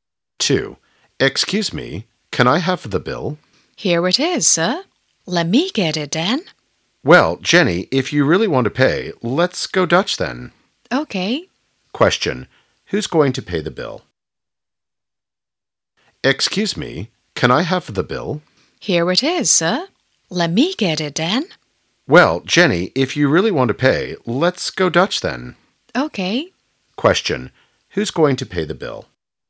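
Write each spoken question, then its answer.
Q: Who's going to pay the bill?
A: Both of them; they will go Dutch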